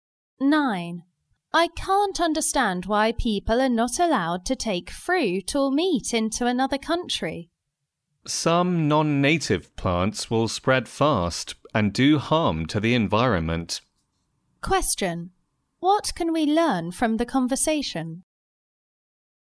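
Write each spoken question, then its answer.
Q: What can we learn from the conversation?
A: Some non-native plants can spread fast and harm the environment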